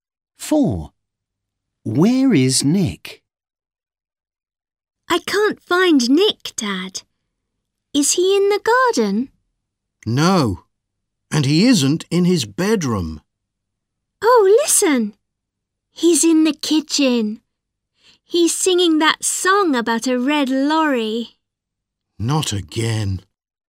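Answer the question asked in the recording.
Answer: in the kitchen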